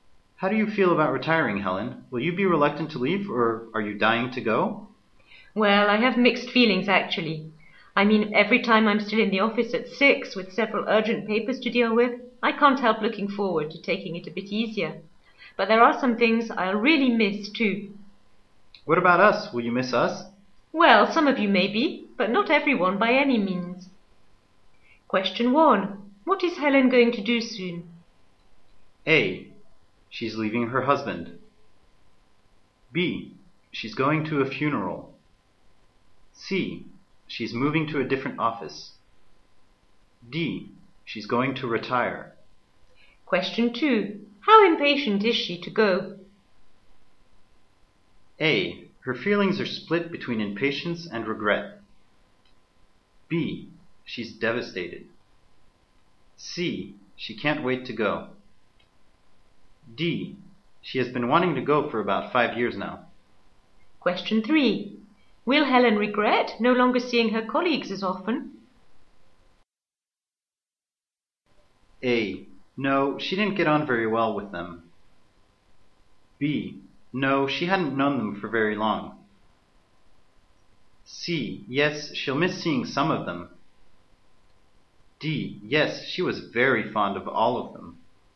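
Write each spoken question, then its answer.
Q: What is Helen going to do soon?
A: D: She's going to retire.

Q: How impatient is she to go?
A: A: Her feelings are split between impatience and regret.

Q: Will Helen regret no longer seeing her colleagues as often?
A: C: Yes, she'll miss seeing some of them.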